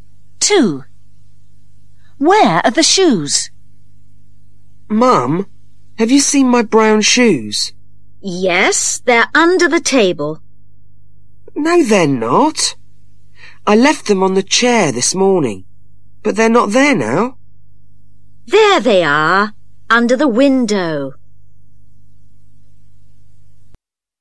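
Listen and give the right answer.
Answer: Under the window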